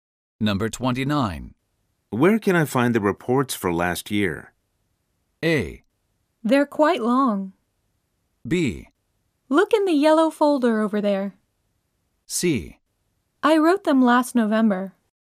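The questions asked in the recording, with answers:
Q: Where can I find the reports for last year?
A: B: Look in the yellow folder over there.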